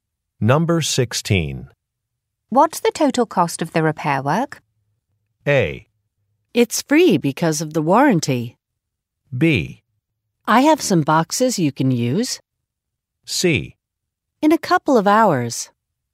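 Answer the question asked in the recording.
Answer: A: It's free because of the warranty.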